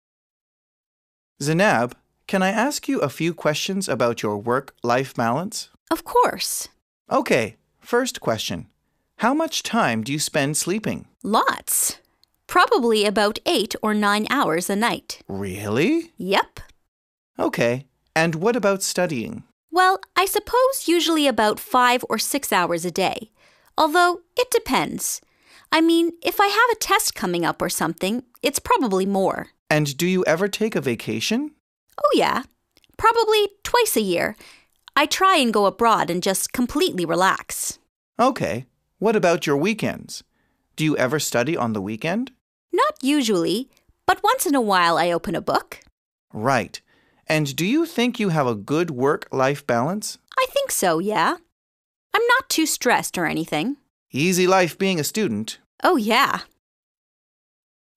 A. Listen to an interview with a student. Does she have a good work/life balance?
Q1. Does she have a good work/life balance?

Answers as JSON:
{"1": "Yes, she has a good work/life balance."}

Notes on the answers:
I think so, yeah. I'm not too stressed or anything.